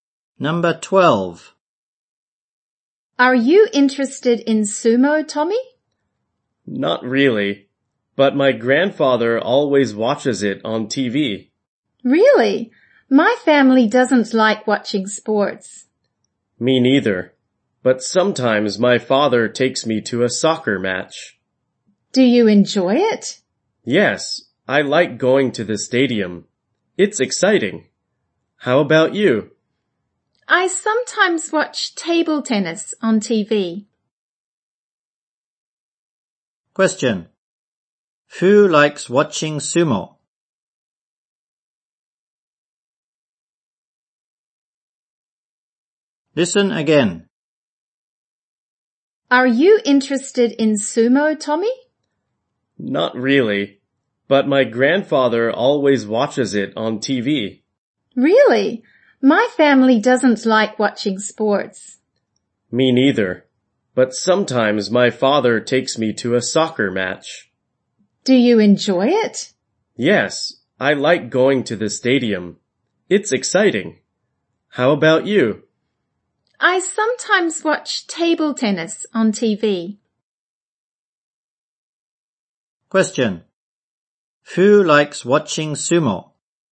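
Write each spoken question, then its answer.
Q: Who likes watching sumo?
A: Tommy's grandfather.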